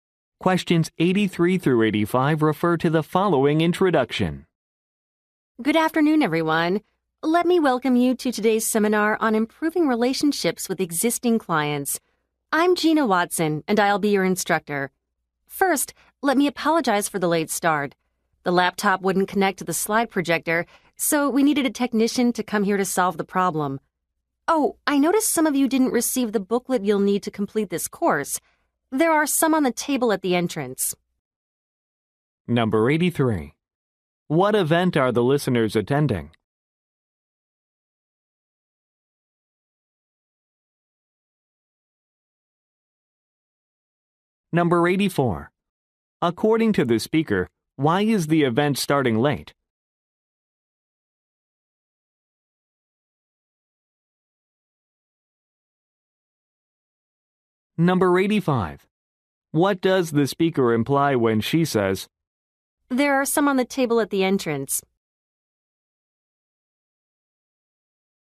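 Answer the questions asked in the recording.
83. A seminar on improving relationships with existing clients
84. The laptop wouldn't connect to the projector
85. Those without a booklet can pick one up at the entrance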